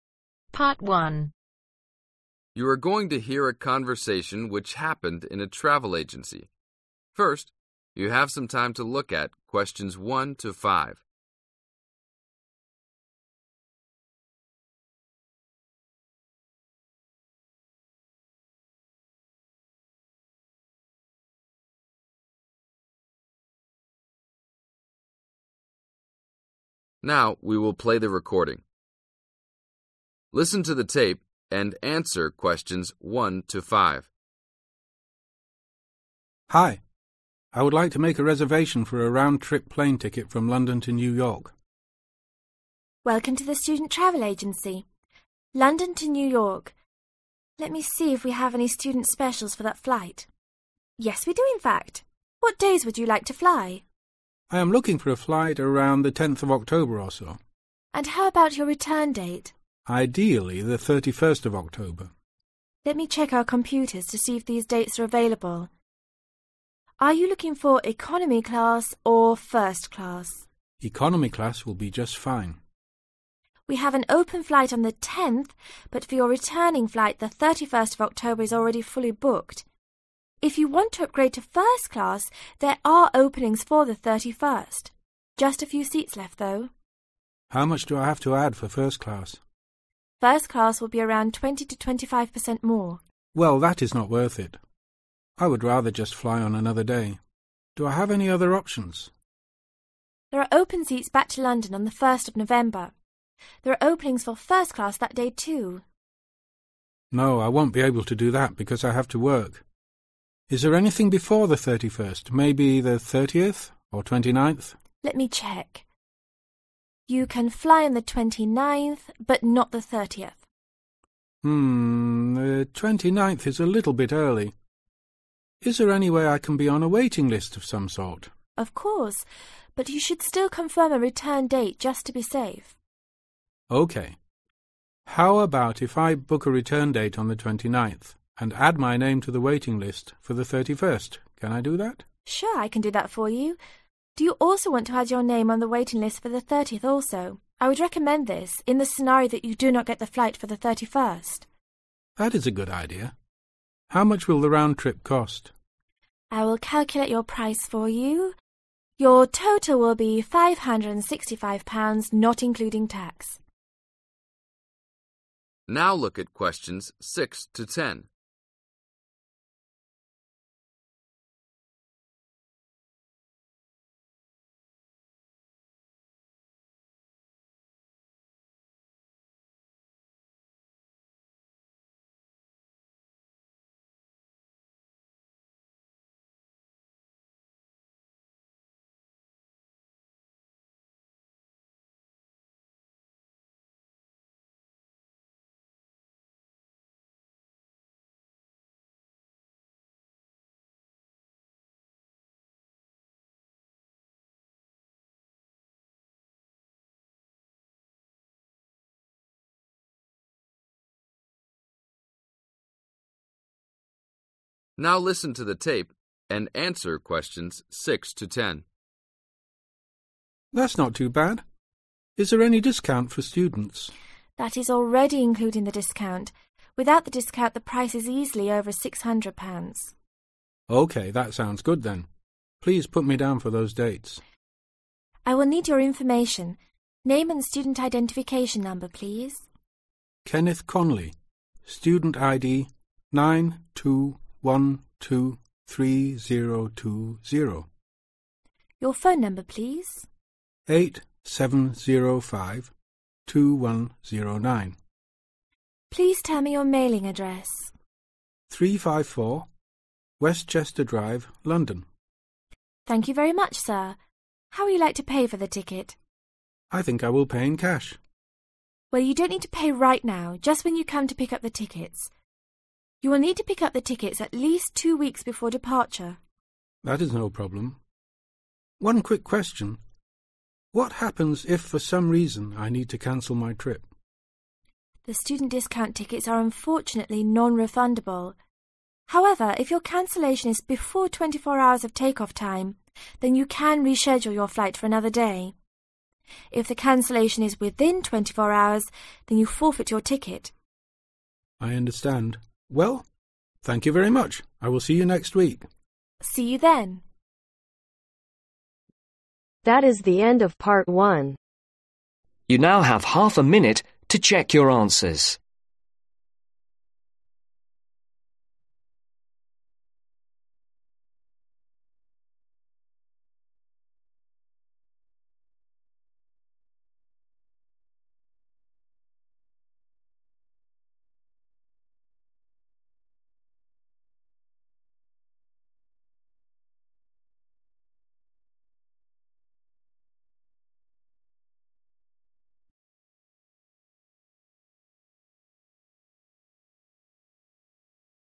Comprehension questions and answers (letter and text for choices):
Complete the information below. Write ONE WORD OR A NUMBER for each answer.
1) The ideal return dates of Kenneth's trip October ............ .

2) The additional cost of fly first class 20% – 25% ............ .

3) What must Kenneth fly before the first of November ?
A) he has to be home for classes.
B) he has to be home for work.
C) he has to be home to see his parents.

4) What date does Kenneth book his flight for ?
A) October 29th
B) October 30th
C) October 31th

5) How much is the total for his flight ?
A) £545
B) £555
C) £565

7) Phone number: ............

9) How long before departure must Kenneth pick up his tickets ?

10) What will happen if Kenneth cancels his trip within 24 hours of take off ?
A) he must reschedule his trip.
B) he gets a full refund.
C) he forfeits his ticket.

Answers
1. 31
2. More
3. B) he has to be home for work.
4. A) October 29th
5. C) £565
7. 87052109
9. 2 weeks
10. C) he forfeits his ticket.